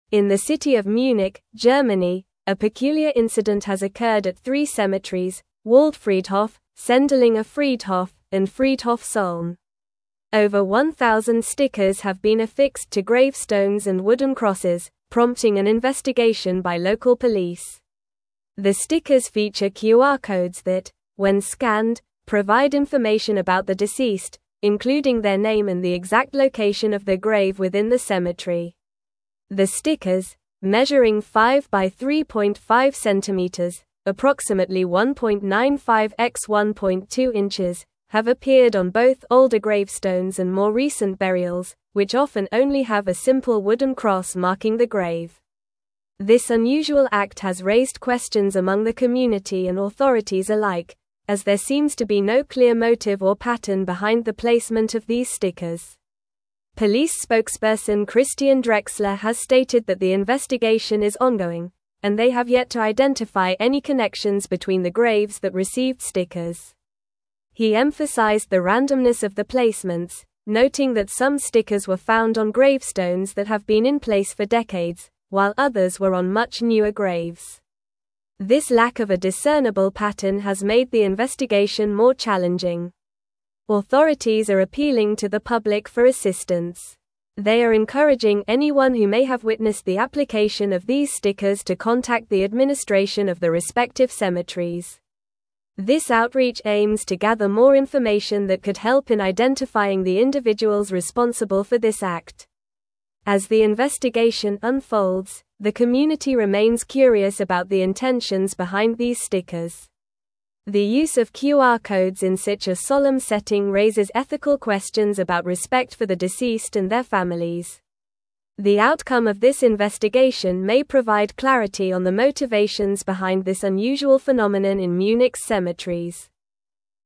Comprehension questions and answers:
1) In the city of Munich, Germany, a peculiar (1)______ has occurred at three cemeteries: Waldfriedhof, Sendlinger Friedhof, and Friedhof Solln.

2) Over 1,000 stickers have been affixed to (2)______stones and wooden (3)______, prompting an (4)______ by local police.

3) Over 1,000 stickers have been affixed to (2)______stones and wooden (3)______, prompting an (4)______ by local police.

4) Over 1,000 stickers have been affixed to (2)______stones and wooden (3)______, prompting an (4)______ by local police.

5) have appeared on both older gravestones and more recent (5)______, which often only have a simple (6)______ cross (7)______ the grave.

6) have appeared on both older gravestones and more recent (5)______, which often only have a simple (6)______ cross (7)______ the grave.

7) have appeared on both older gravestones and more recent (5)______, which often only have a simple (6)______ cross (7)______ the grave.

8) they have yet to identify any (8)______ between the graves that received (9)______.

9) they have yet to identify any (8)______ between the graves that received (9)______.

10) noting that some stickers were found on gravestones that have been in place for (10)______, while others were on much newer graves.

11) (11)______ are appealing to the public for assistance.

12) They are encouraging anyone who may have (12)______ the application of these stickers to contact the administration of the respective cemeteries.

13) As the investigation unfolds, the community remains (13)______ about the intentions behind these stickers.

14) The use of QR codes in such a (14)______ setting raises ethical (15)______ about (16)______ for the deceased and their families.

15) The use of QR codes in such a (14)______ setting raises ethical (15)______ about (16)______ for the deceased and their families.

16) The use of QR codes in such a (14)______ setting raises ethical (15)______ about (16)______ for the deceased and their families.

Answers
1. incident
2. grave
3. crosses
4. investigation
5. burials
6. wooden
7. marking
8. connections
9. stickers
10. decades
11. Authorities
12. witnessed
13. curious
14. solemn
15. questions
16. respect

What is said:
In the city of Munich, Germany, a peculiar incident has occurred at three cemeteries: Waldfriedhof, Sendlinger Friedhof, and Friedhof Solln. Over 1,000 stickers have been affixed to gravestones and wooden crosses, prompting an investigation by local police. The stickers feature QR codes that, when scanned, provide information about the deceased, including their name and the exact location of their grave within the cemetery.
The stickers, measuring 5×3.5 centimeters (approximately 1.95×1.2 inches), have appeared on both older gravestones and more recent burials, which often only have a simple wooden cross marking the grave. This unusual act has raised questions among the community and authorities alike, as there seems to be no clear motive or pattern behind the placement of these stickers.
Police spokesperson Christian Drexler has stated that the investigation is ongoing, and they have yet to identify any connections between the graves that received stickers. He emphasized the randomness of the placements, noting that some stickers were found on gravestones that have been in place for decades, while others were on much newer graves. This lack of a discernible pattern has made the investigation more challenging.
Authorities are appealing to the public for assistance. They are encouraging anyone who may have witnessed the application of these stickers to contact the administration of the respective cemeteries. This outreach aims to gather more information that could help in identifying the individuals responsible for this act.
As the investigation unfolds, the community remains curious about the intentions behind these stickers. The use of QR codes in such a solemn setting raises ethical questions about respect for the deceased and their families. The outcome of this investigation may provide clarity on the motivations behind this unusual phenomenon in Munich's cemeteries.

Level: Level 4